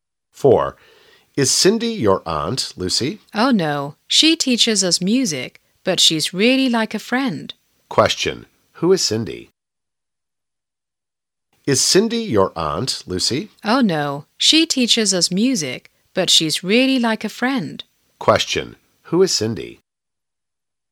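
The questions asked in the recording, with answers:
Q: Who is Cindy?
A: Lucy's music teacher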